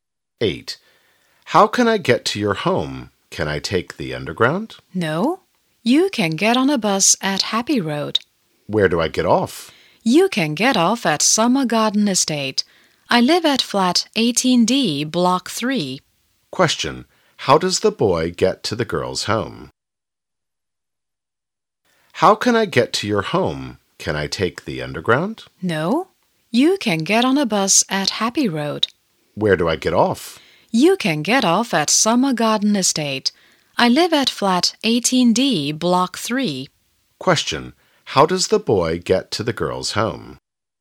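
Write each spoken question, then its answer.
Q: How does the boy get to the girl's home?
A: By bus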